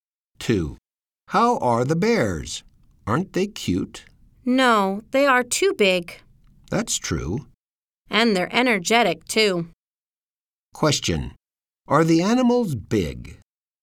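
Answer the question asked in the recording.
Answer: Yes, they are.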